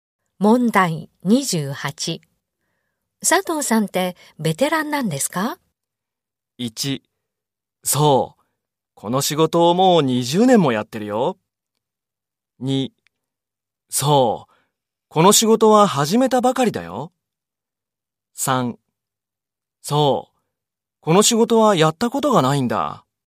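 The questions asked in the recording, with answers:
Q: 佐藤さんってベテランなんですか?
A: 1: そう。この仕事をもう20年もやってるよ。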